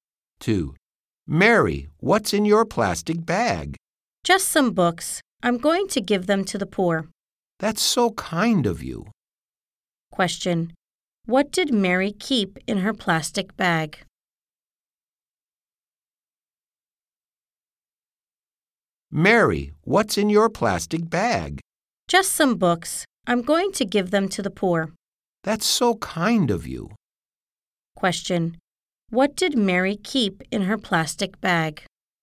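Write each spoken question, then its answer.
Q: Question, what did Mary keep in her plastic bag?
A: Some books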